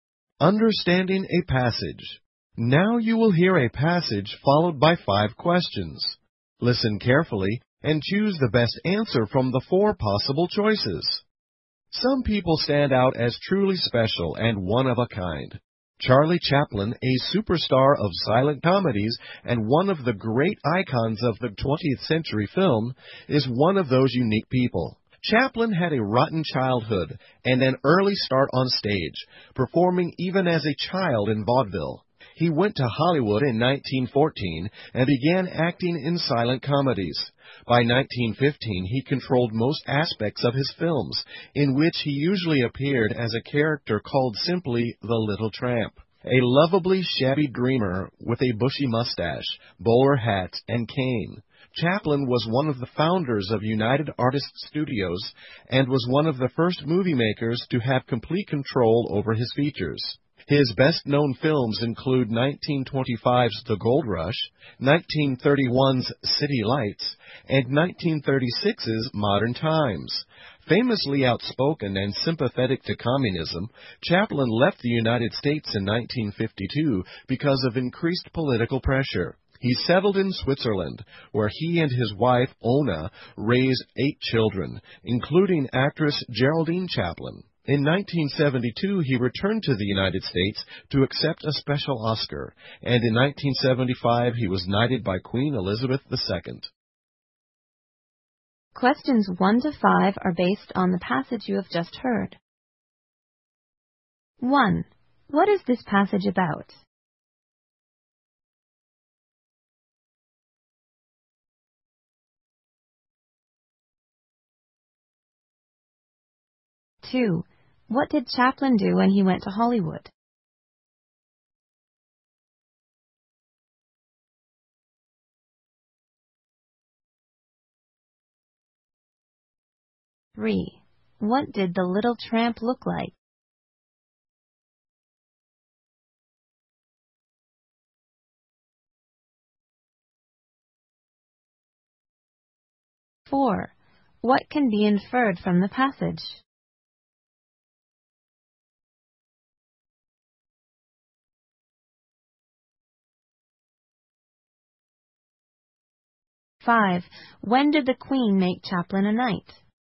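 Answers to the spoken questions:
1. Charlie Chaplin's life
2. He began acting in silent comedies
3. Shabby, with a bushy mustache, bowler hat and cane
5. In 1975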